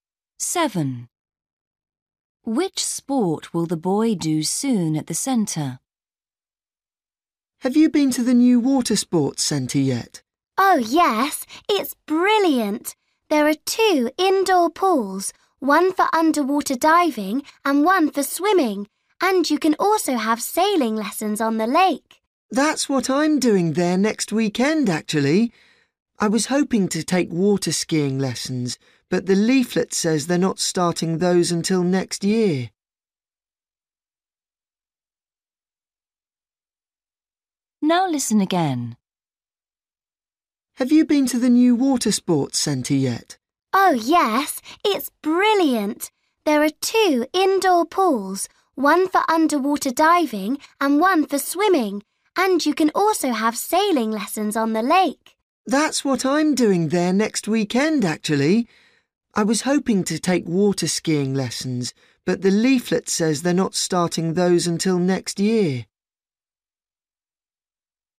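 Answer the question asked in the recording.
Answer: sailing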